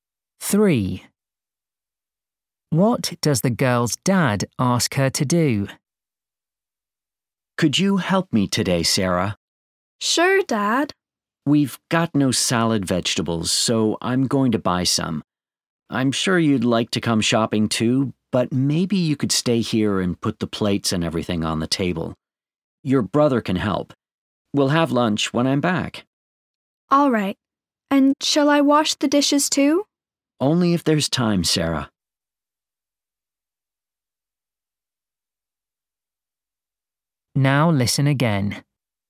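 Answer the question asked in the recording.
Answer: set the table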